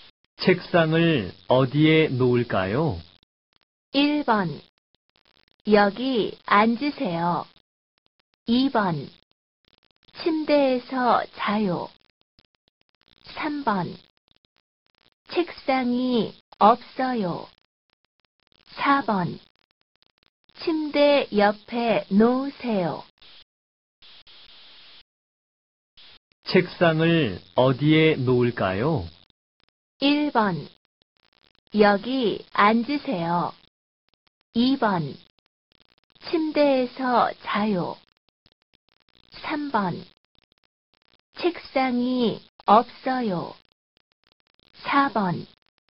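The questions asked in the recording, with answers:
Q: 책상을 어디에 놓을까요?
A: 4: 침대 옆에 놓으세요.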